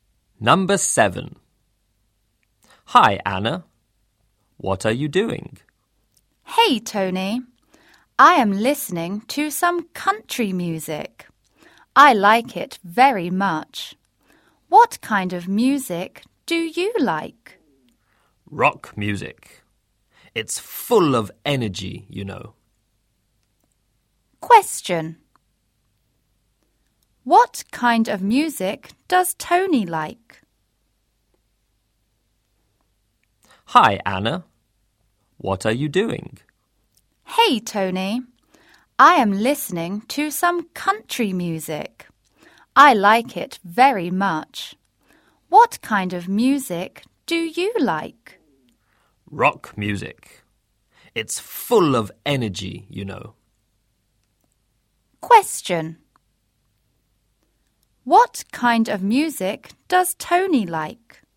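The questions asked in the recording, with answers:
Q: What kind of music does Tony like?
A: Rock music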